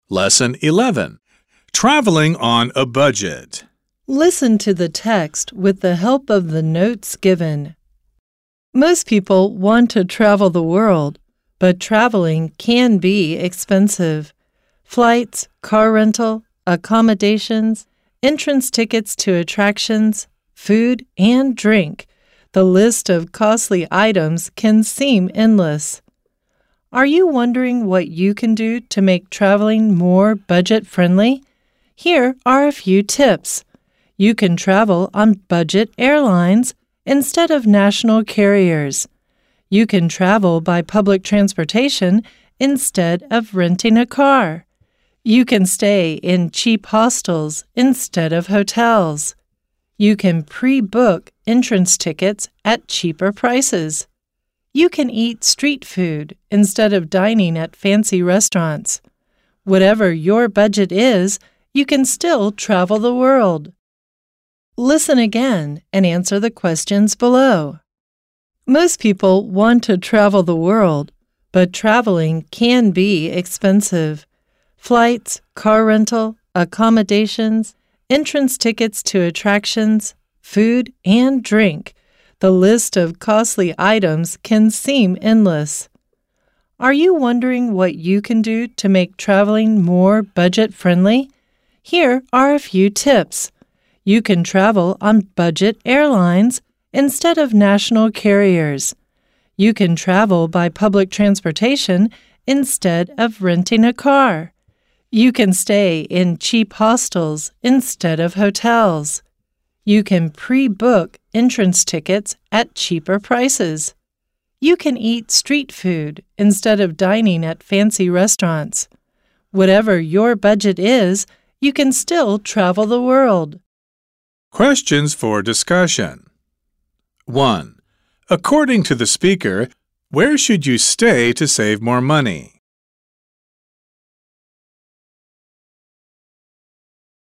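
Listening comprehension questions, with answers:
再次聆聽並回答問題 Listen again and answer the questions below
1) According to the speaker, where should you stay to save more money?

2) Does the speaker recommend dining at fancy restaurants?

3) According to the speaker, is it possible to travel on a low budget?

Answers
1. In cheap hostels instead of hotels.
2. No, the speaker recommends eating street food instead.
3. Yes, whatever your budget is, you can still travel the world.

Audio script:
Most people want to travel the world, but traveling can be expensive. Flights, car rental, accommodations, entrance tickets to attractions, food and drink... The list of costly items can seem endless.
Are you wondering what you can do to make traveling more
budget-friendly? Here are a few tips! You can travel on budget airlines instead of national carriers. You can travel by public transportation instead of renting a car. 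You can stay in cheap hostels instead of hotels. You can pre-book entrance tickets at cheaper prices. You can eat street food instead of dining at fancy restaurants. Whatever your budget is, you can still travel the world.

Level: 中階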